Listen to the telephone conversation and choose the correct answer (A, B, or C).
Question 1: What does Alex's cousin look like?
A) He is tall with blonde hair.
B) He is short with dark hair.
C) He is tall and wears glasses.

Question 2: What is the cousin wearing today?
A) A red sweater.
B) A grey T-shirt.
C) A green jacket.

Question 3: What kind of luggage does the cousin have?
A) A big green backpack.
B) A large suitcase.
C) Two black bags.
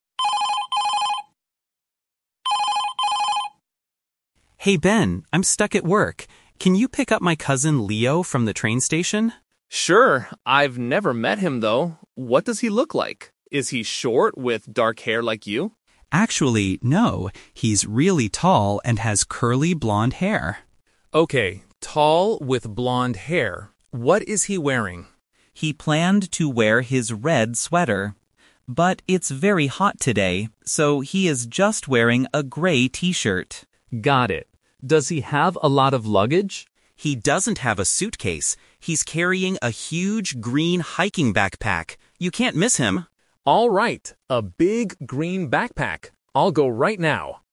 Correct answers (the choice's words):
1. He is tall with blonde hair.
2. A grey T-shirt.
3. A big green backpack.

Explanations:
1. Alex clearly describes his cousin: "He's really tall and has curly blonde hair."
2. Alex uses a "Twist" here. He says Leo is "just wearing a grey T-shirt" because the weather is hot.
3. Alex says, "He's carrying a huge green hiking backpack."

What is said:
Alex: Hey Ben, I'm stuck at work. Can you pick up my cousin, Leo, from the train station?
Ben: Sure. I've never met him though. What does he look like? Is he short with dark hair like you?
Alex: Actually, no. He's really tall and has curly blonde hair.
Ben: Okay, tall with blonde hair. What is he wearing?
Alex: He planned to wear his red sweater. But it's very hot today, so he is just wearing a grey T-shirt.
Ben: Got it. Does he have a lot of luggage?
Alex: He doesn't have a suitcase. He's carrying a huge green hiking backpack. You can't miss him!